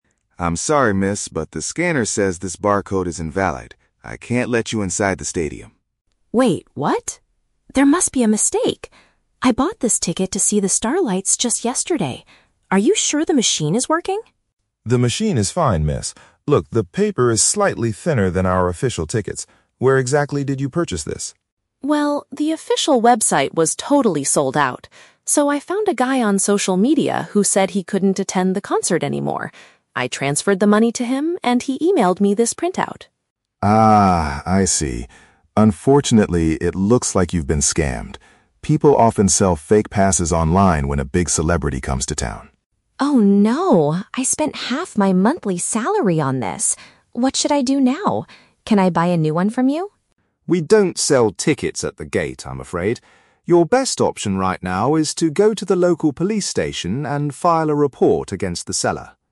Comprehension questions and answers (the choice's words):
Listen to a conversation between a fan and a security guard. Choose the correct answer (A, B, or C) for each question.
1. Why is the fan not allowed to enter the stadium?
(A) Because she brought a printed paper instead of a digital ticket.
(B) Because the ticket she is holding is not genuine.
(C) Because she arrived too late for the band's performance.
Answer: Because the ticket she is holding is not genuine.

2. How did the fan get the ticket?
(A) She purchased it directly from the band's official website.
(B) She received it from a friend who was unable to attend.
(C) She paid a stranger she met on the internet for it.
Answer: She paid a stranger she met on the internet for it.

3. What does the security guard suggest the fan do next?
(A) Purchase a replacement pass at the stadium entrance.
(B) Contact the authorities to report the crime.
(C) Send a complaint email to the ticket company.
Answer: Contact the authorities to report the crime.

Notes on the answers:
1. The guard says the barcode is "invalid", the paper is thin, and she has been "scammed" with "fake passes" (which paraphrases to the ticket is not genuine).
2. The fan says she "found a guy on social media" and "transferred the money to him" (which means she paid a stranger she met on the internet).
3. The guard tells her to "go to the local police station and file a report" (which paraphrases to contacting the authorities to report the crime).

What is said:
Security Guard: I'm sorry, miss, but the scanner says this barcode is invalid. I can't let you inside the stadium.
Fan: Wait, what? There must be a mistake! I bought this ticket to see The Starlights just yesterday. Are you sure the machine is working?
Security Guard: The machine is fine, miss. Look, the paper is slightly thinner than our official tickets. Where exactly did you purchase this?
Fan: Well, the official website was totally sold out. So, I found a guy on social media who said he couldn't attend the concert anymore. I transferred the money to him, and he emailed me this printout.
Security Guard: Ah, I see. Unfortunately, it looks like you've been scammed. People often sell fake passes online when a big celebrity comes to town.
Fan: Oh no... I spent half my monthly salary on this! What should I do now? Can I buy a new one from you?
Security Guard: We don't sell tickets at the gate, I'm afraid. Your best option right now is to go to the local police station and file a report against the seller.